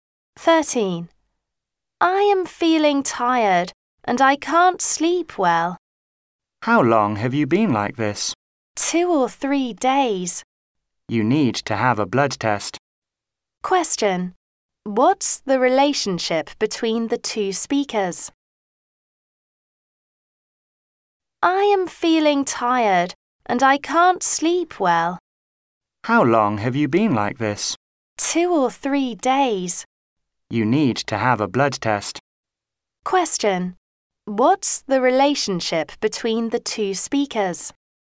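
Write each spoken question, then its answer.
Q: What's the relationship between the two speakers?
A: Patient and doctor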